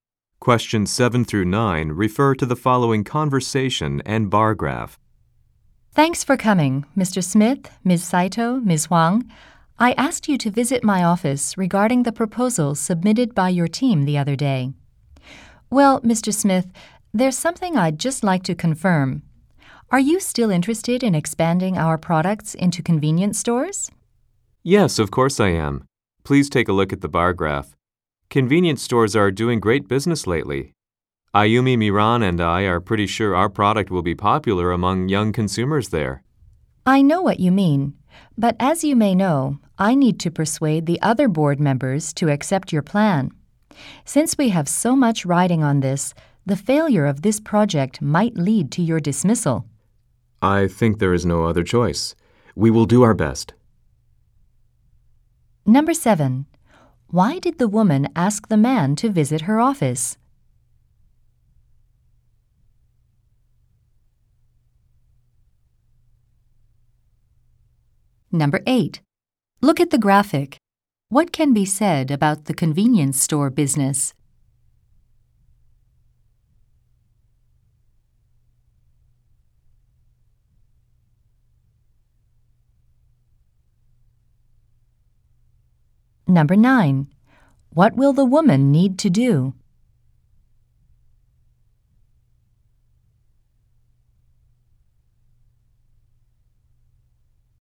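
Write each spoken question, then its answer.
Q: Why did the woman ask the man to visit her office?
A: To discuss the proposal his team submitted

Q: What will the woman need to do?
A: Persuade the other board members to accept the plan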